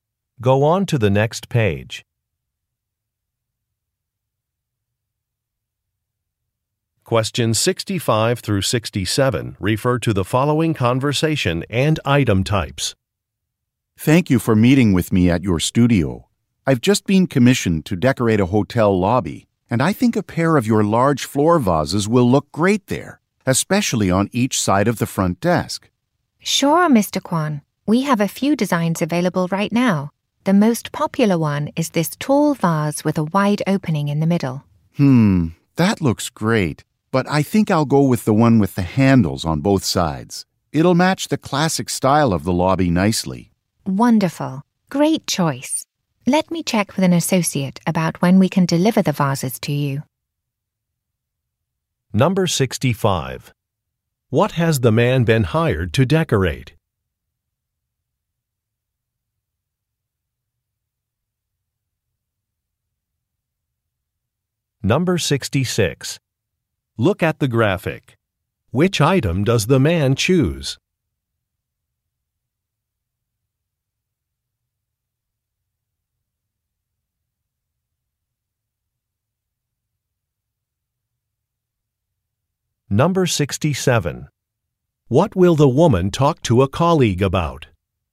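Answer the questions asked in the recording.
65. A hotel lobby
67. When the vases can be delivered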